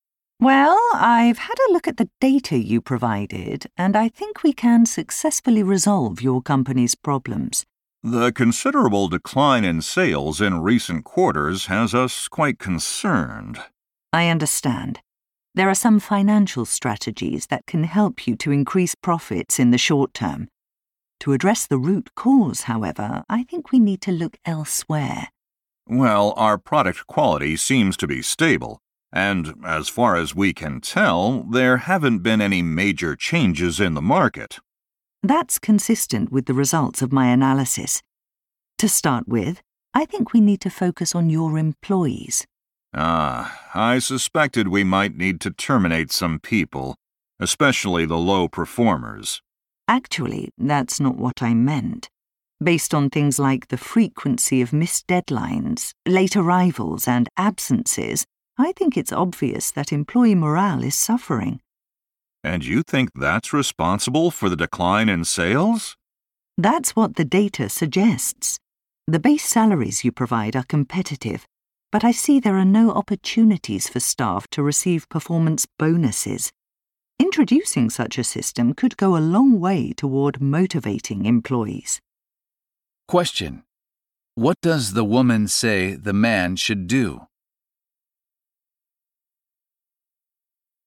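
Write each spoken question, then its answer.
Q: What does the woman say the man should do?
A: Introduce a performance bonus system for employees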